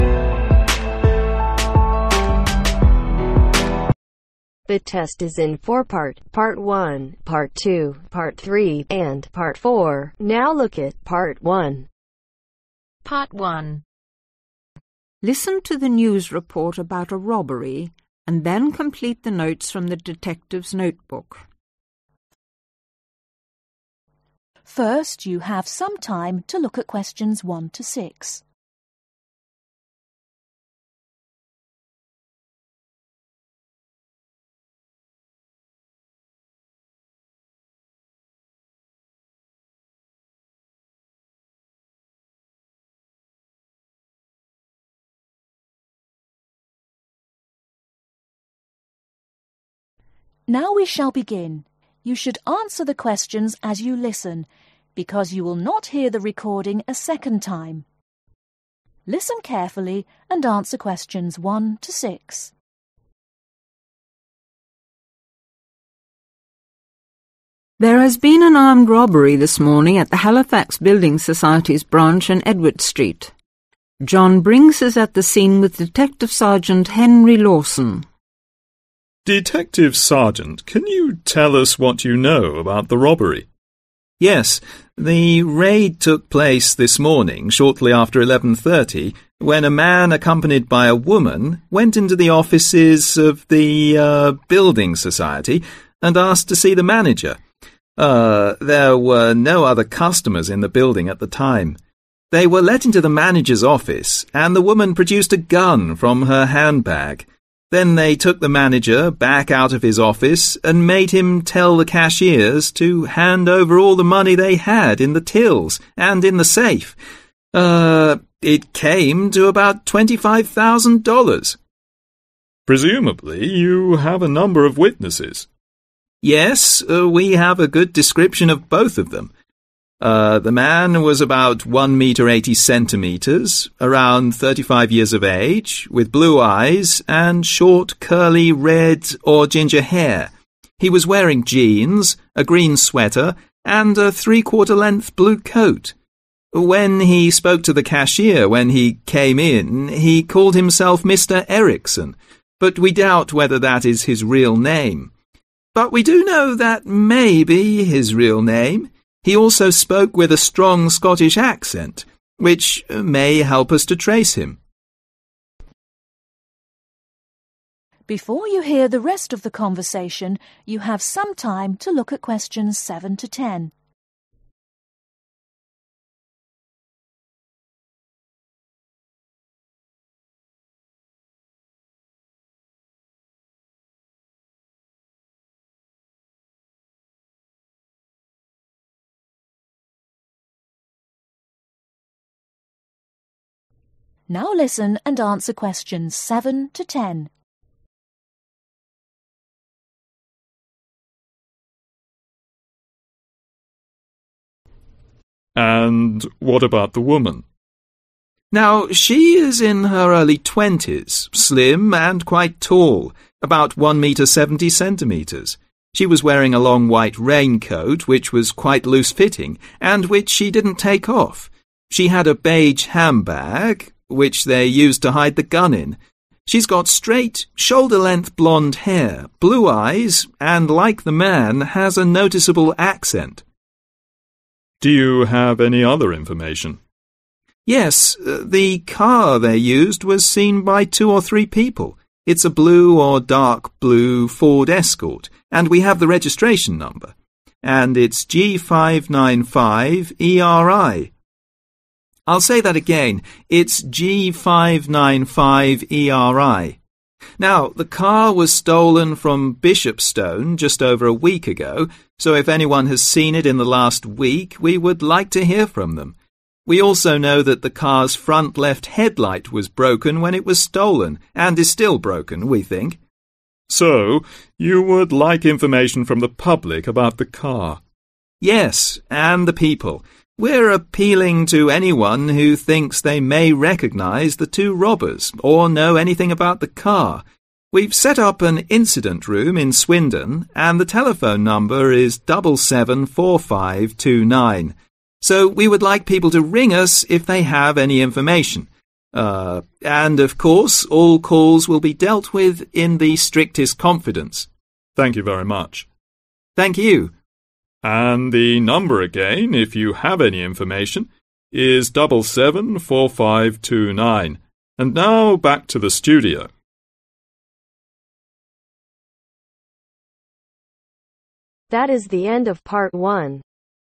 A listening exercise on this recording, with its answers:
Complete the notes.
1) Place: Halifax Building (1)............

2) Amount stolen: (2)............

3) Age: around (3)............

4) Eye color: (4)............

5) Clothes: (5)............, green sweater, three-quarter-length blue coat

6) Accent: (6)............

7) Clothes: long white (loose-fitting) (7)............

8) Dark ............ Ford Excort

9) ............ number: G595 ERI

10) Headlight: (10)............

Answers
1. Society
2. 25000
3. 35
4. Blue
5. Jeans
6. Scottish
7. Raincoat
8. Blue
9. Registration
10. Broken